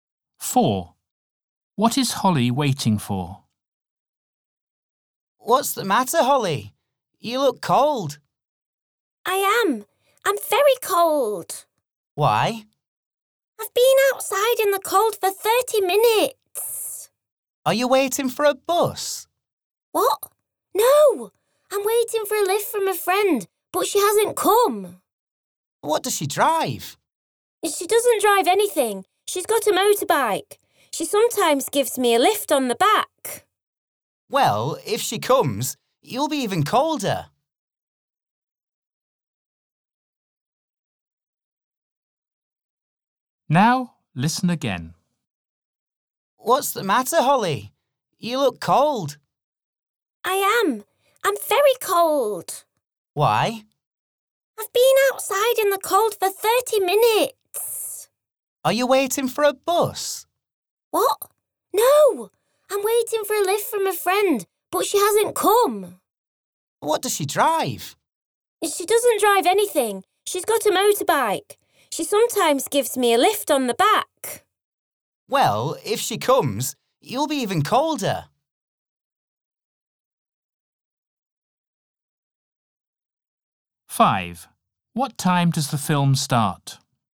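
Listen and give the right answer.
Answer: a lift from a friend on a motorbike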